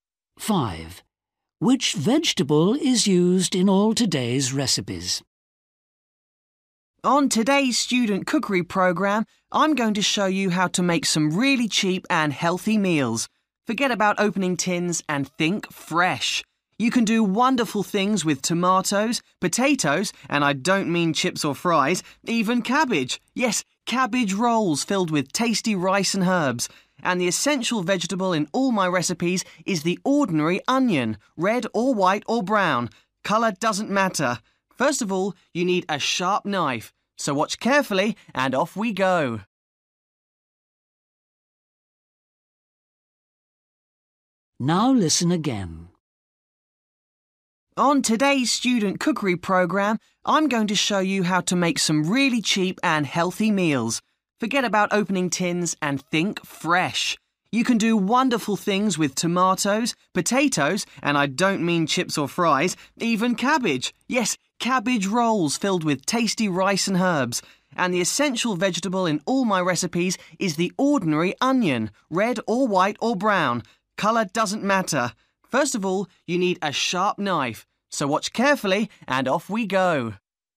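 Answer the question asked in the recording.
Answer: onion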